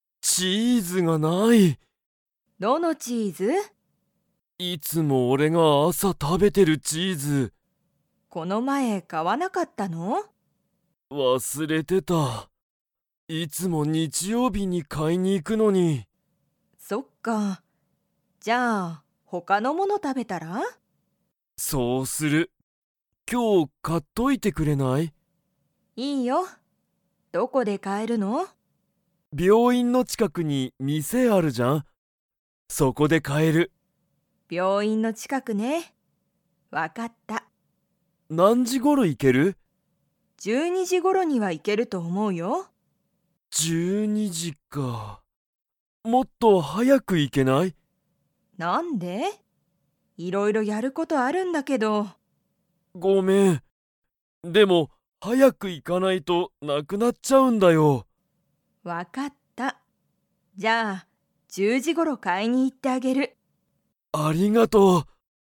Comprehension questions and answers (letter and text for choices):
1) ケントはいつも____チーズを食たべる。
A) 土曜日どようびに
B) 日曜日にちようびに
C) 朝あさ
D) あまり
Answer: C) 朝あさ

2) ケントの母ははは、10じゅう時じにお店みせに行いきますか?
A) はい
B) いいえ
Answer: A) はい

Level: Level 2